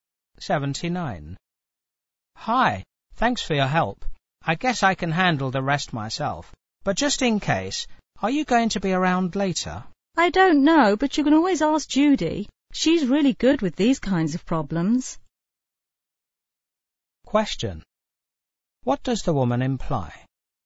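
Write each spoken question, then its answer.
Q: What does the woman imply?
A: She may not be around later, so the man can ask Judy for help.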